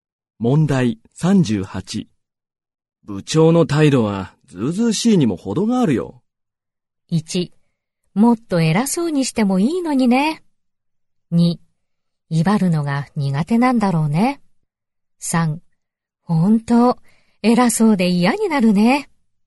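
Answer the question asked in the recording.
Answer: 3: 本当、偉そうで嫌になるね。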